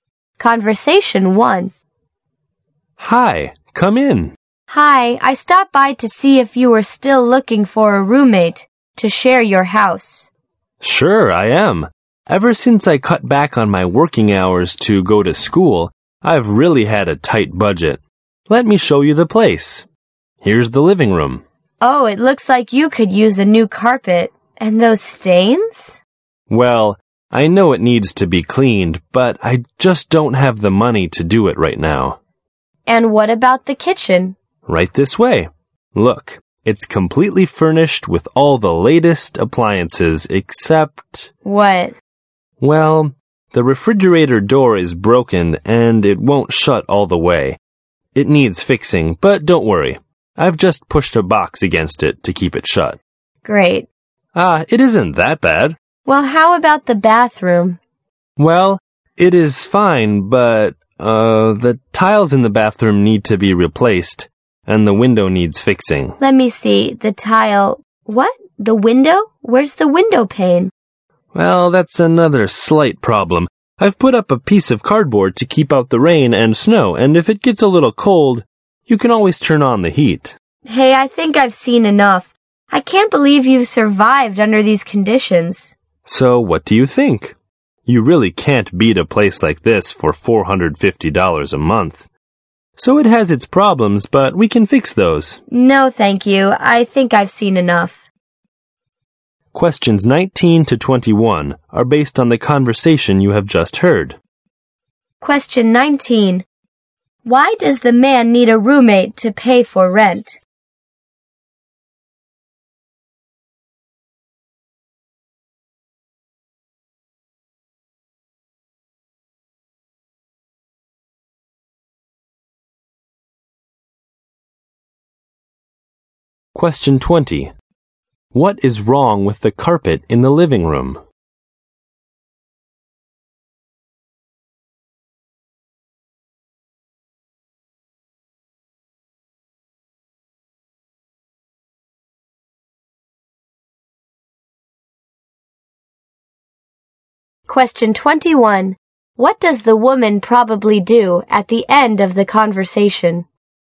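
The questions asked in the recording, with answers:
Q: Why does the man need a roommate to pay for rent?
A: He cut back his working hours to go to school and has a tight budget

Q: What is wrong with the carpet in the living room?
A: It has stains and needs cleaning

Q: What does the woman probably do at the end of the conversation?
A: She declines to rent the place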